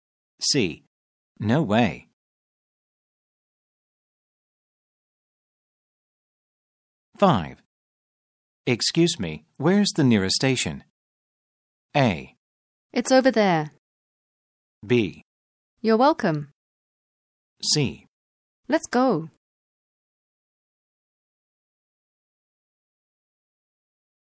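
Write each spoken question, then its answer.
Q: Excuse me, where's the nearest station?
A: A: It's over there.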